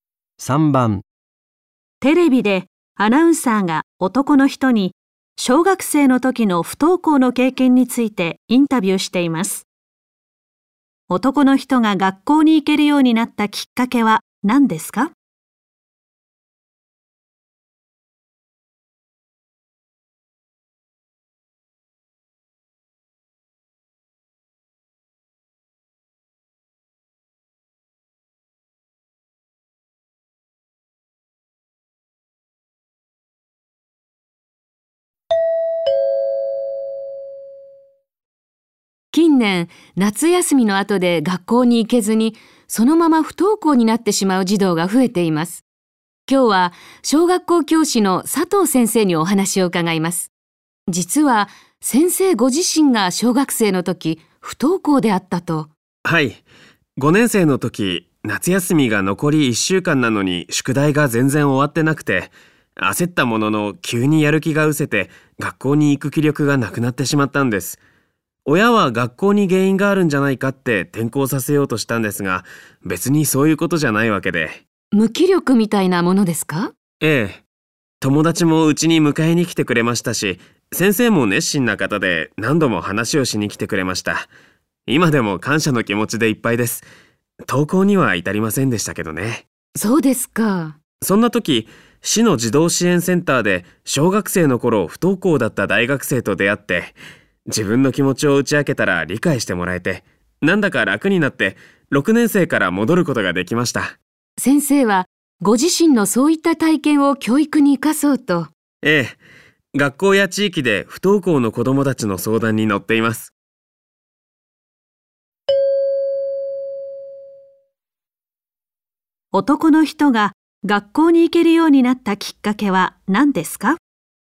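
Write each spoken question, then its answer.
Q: 男の人が学校に行けるようになったきっかけは何ですか?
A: 児童支援センターで、昔不登校だった大学生に気持ちを理解してもらったこと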